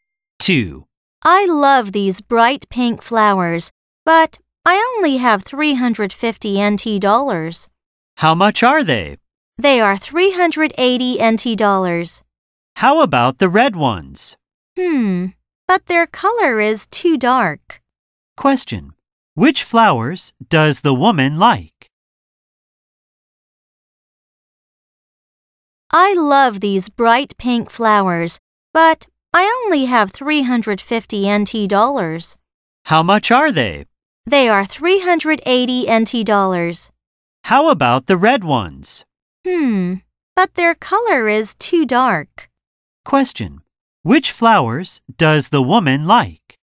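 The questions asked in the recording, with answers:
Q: Which flowers does the woman like?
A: The bright pink flowers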